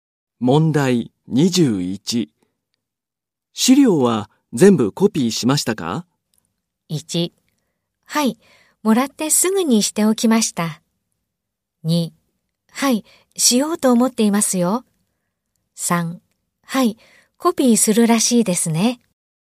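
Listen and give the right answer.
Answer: 1: はい、もらってすぐにしておきました。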